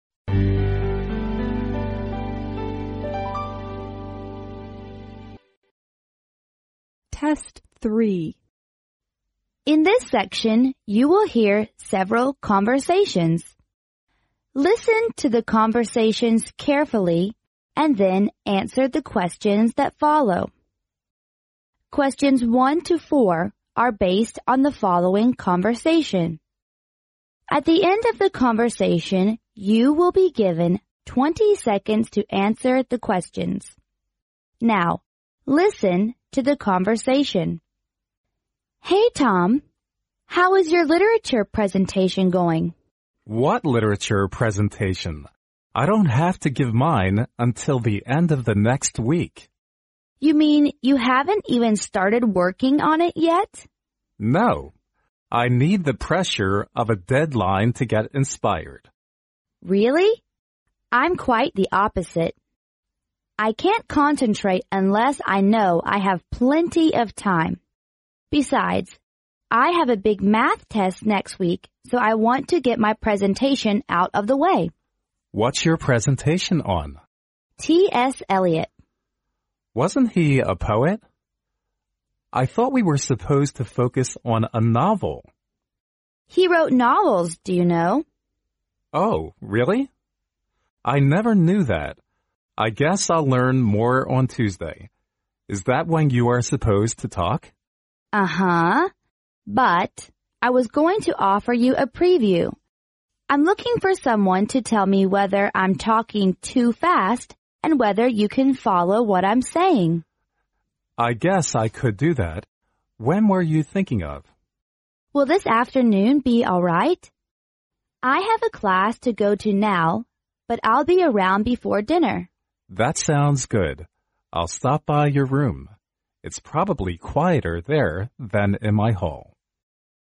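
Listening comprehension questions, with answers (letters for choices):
Now, listen to the conversation.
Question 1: What can we learn about the man at the beginning of the conversation?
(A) He is eager to work on the presentation.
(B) He has plenty of time to prepare for the presentation.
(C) He doesn't know there is a literature presentation until the woman tells him.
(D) He may not start to prepare for the presentation until next week.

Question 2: Which is NOT the reason why the woman wants to get her presentation out of the way?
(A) She wants to collect more information about her topic.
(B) She is quite the opposite of the man's attitude towards the presentation.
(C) She can't concentrate unless she has plenty of time.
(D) She has an important math test next week.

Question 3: According to the man, the presentation needs to be about a(n)_____.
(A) novelist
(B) poetnovel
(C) novel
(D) essay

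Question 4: What can be inferred from the preview?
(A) During the preview the man will give suggestions to the woman.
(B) The man agrees to take the preview for he knows a lot about T. S Eliot.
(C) The man has a class now so they will do the preview before dinner.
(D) The preview will take place in the man's room because it's quiet.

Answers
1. D
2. A
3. C
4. A

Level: 专业四级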